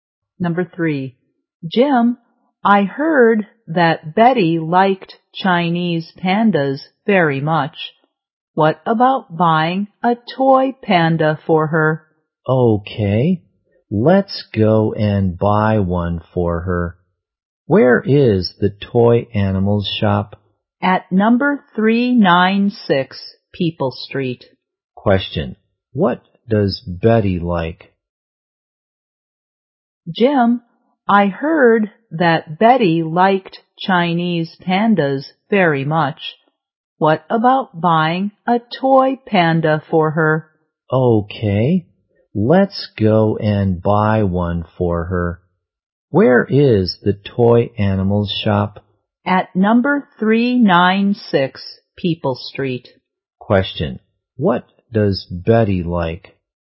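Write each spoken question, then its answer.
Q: what does Betty like?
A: Chinese pandas.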